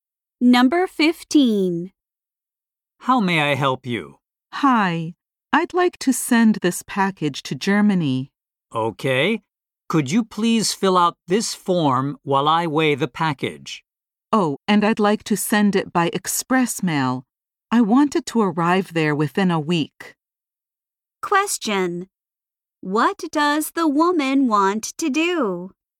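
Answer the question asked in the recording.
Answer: Send a package to Germany by express mail.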